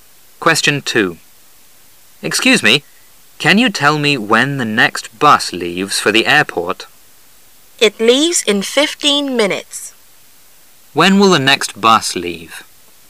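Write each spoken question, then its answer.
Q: When will the next bus leave?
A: In 15 minutes.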